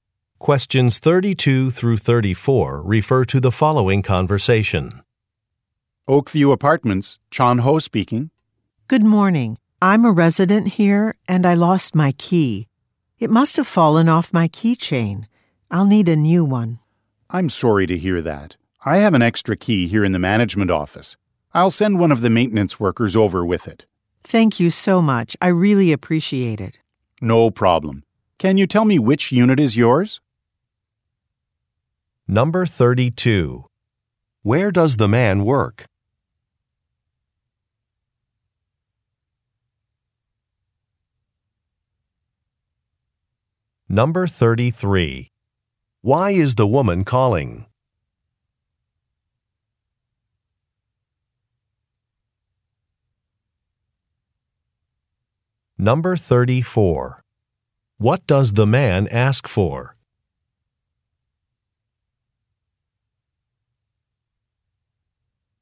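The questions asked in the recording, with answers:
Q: Where does the man work?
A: At an apartment management office

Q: Why is the woman calling?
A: She lost her key

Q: What does the man ask for?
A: Her unit number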